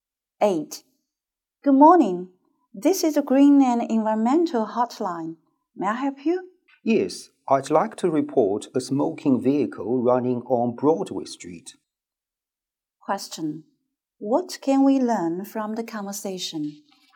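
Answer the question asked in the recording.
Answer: The woman is reporting a smoking vehicle on Broadway Street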